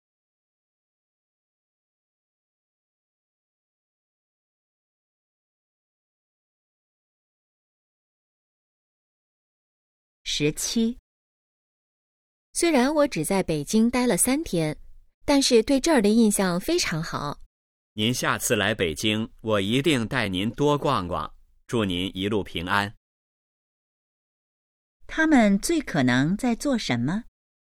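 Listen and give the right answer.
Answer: 送别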